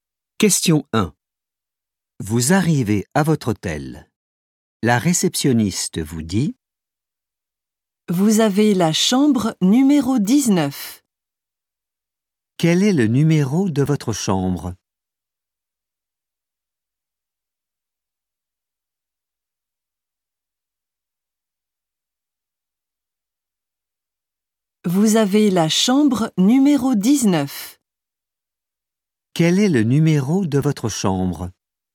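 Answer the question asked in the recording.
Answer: 19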